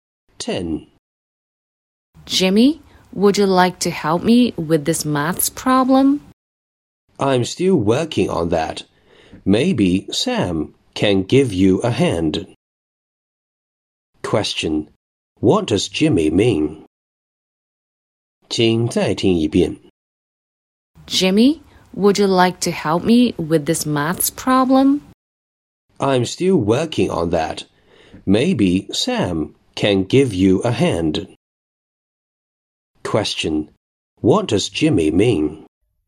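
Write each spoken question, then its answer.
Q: What does Jimmy mean?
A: He can't help because he is still working on the problem himself; Sam may help.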